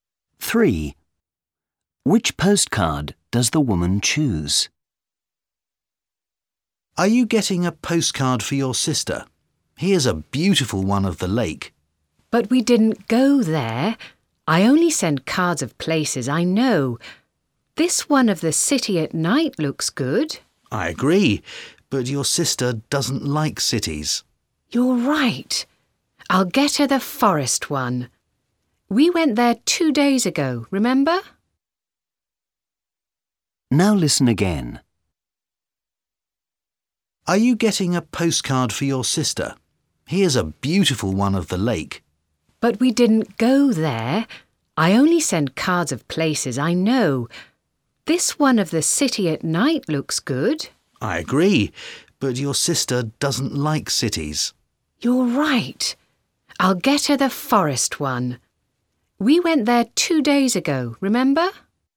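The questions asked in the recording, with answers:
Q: Which postcard does the woman choose?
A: the forest one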